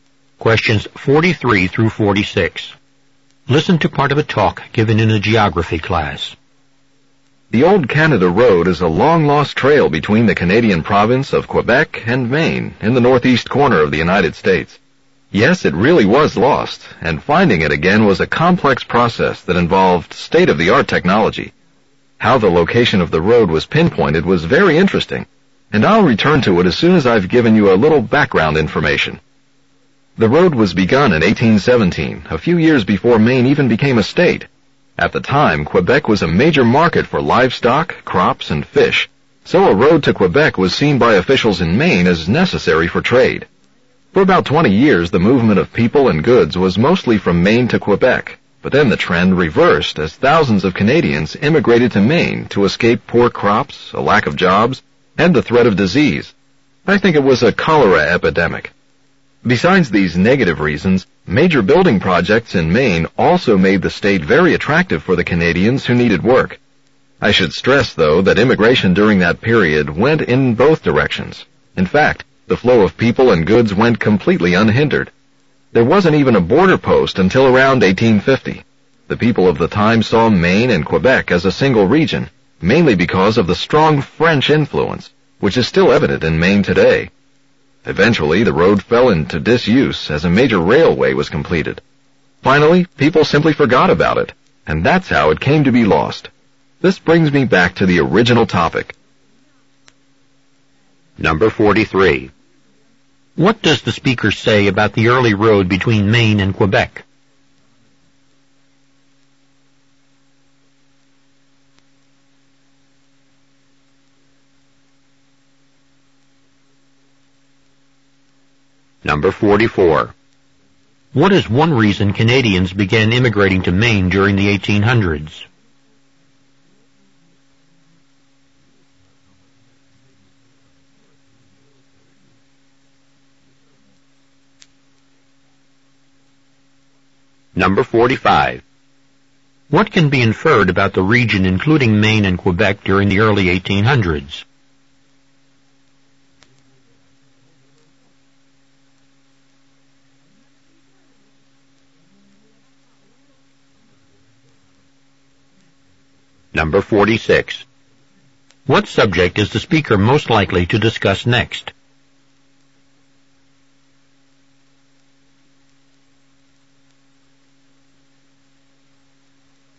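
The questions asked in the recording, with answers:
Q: What is one reason Canadians began immigrating to Maine during the 1800s?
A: To escape poor crops, a lack of jobs, and disease, and to find work on building projects

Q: What subject is the speaker most likely to discuss next?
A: How modern technology was used to find where the old road was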